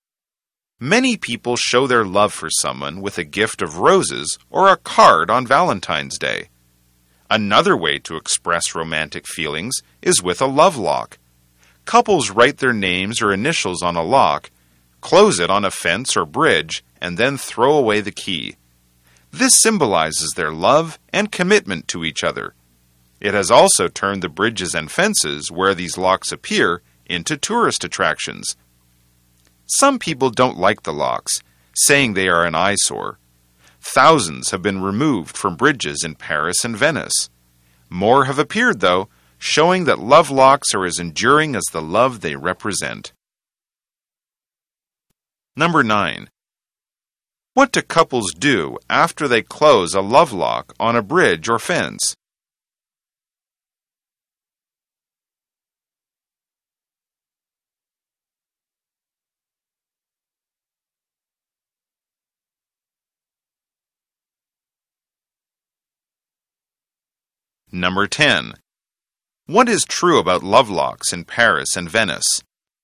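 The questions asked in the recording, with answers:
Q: What do couples do after they close a love lock on a bridge or fence?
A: They throw away the key.

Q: What is true about love locks in Paris and Venice?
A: Thousands have been removed from bridges there, but more have appeared.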